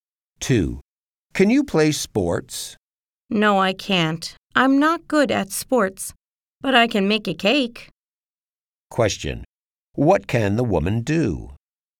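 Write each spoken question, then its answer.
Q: What can the woman do?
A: She can make a cake.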